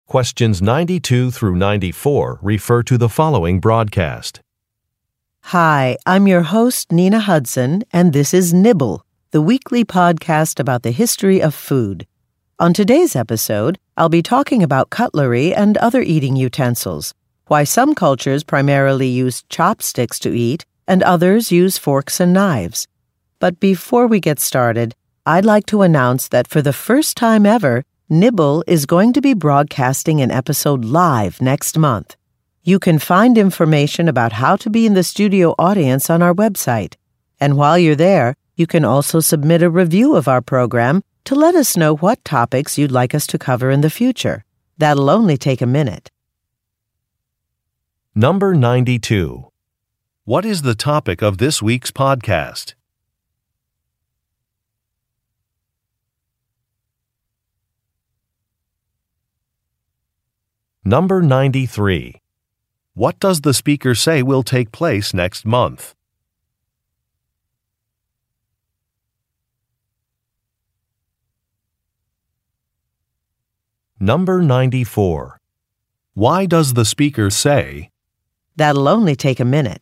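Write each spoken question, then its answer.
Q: What is the topic of this week's podcast?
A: Eating utensils and cutlery (chopsticks, forks and knives) in the history of food

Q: What does the speaker say will take place next month?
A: An episode of the podcast will be broadcast live with a studio audience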